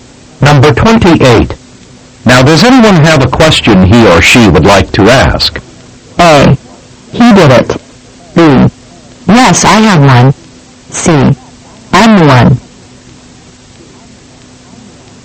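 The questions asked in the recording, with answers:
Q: Now, does anyone have a question he or she would like to ask?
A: B: Yes, I have one.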